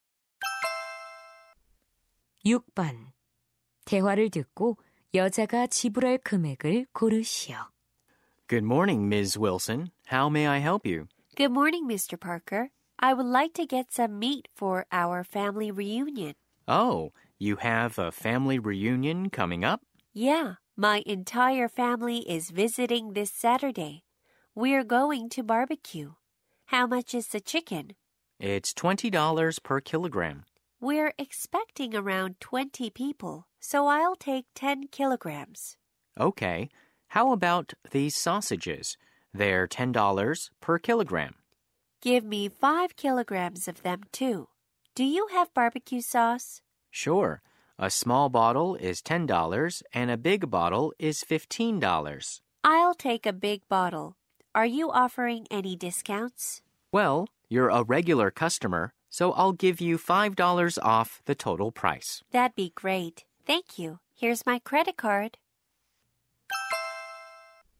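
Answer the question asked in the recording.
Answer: $260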